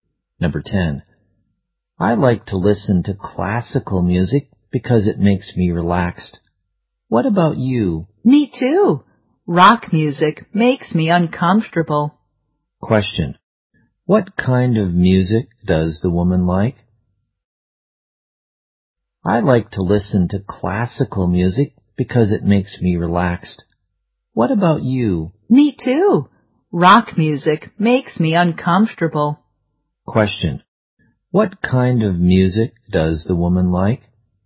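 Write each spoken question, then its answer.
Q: What kind of music does the woman like?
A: Classical music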